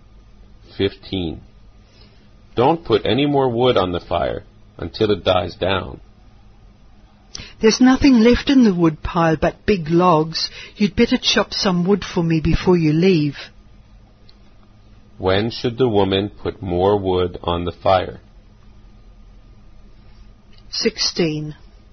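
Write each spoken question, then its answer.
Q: When should the woman put more wood on the fire?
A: When the fire dies down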